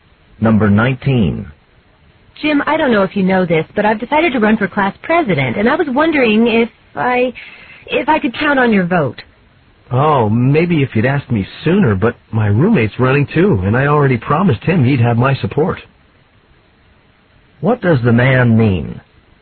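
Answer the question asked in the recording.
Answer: He will vote for his roommate instead.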